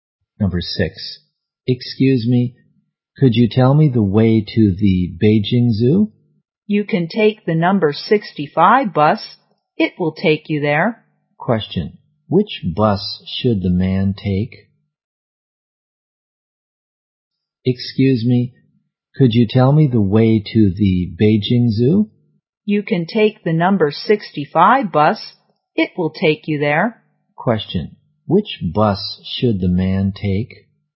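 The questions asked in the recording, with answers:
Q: Which bus should the man take?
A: The number 65 bus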